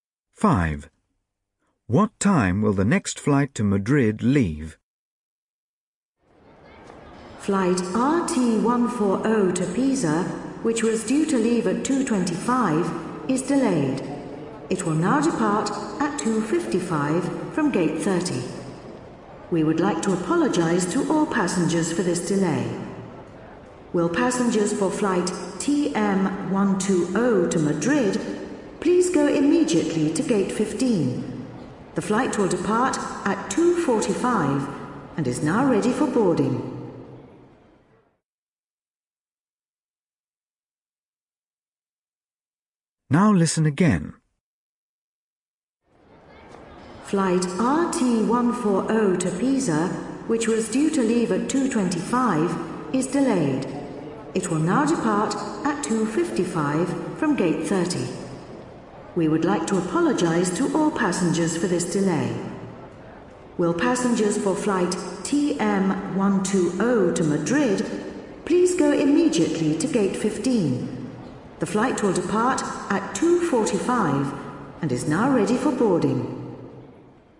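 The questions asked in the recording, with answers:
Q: What time will the next flight to Madrid leave?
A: 2:45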